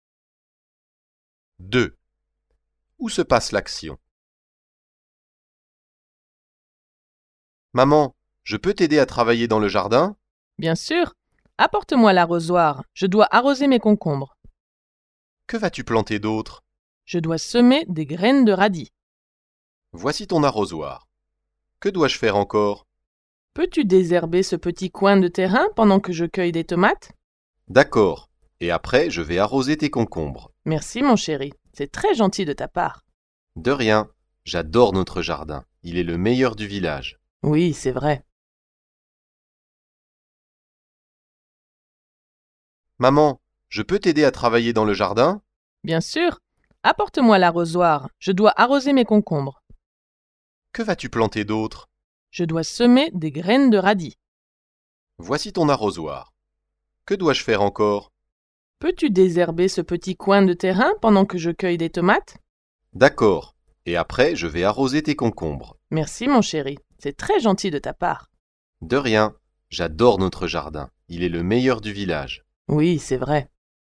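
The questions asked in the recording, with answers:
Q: Où se passe l'action?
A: Dans le jardin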